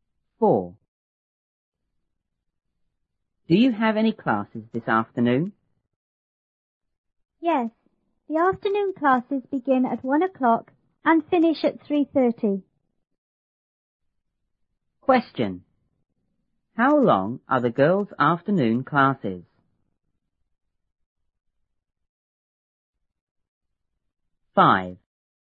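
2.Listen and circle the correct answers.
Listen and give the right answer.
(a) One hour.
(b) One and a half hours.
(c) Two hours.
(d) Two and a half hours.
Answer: (d) Two and a half hours.

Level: 初中英语广州版1B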